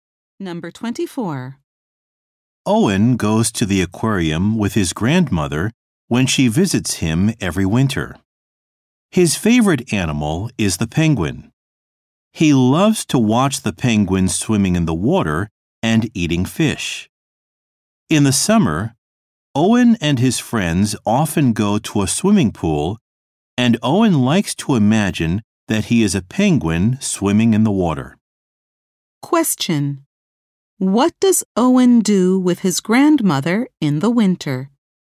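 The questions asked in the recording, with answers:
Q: What does Owen do with his grandmother in the winter?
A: Goes to the aquarium.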